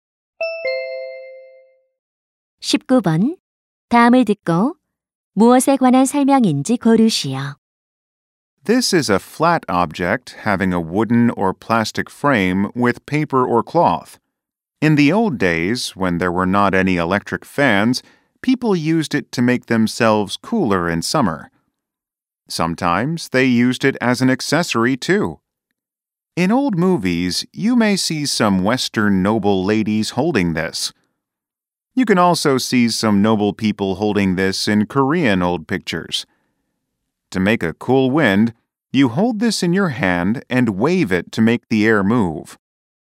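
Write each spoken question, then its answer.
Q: 다음을 듣고 무엇에 관한 설명인지 고르시오.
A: 부채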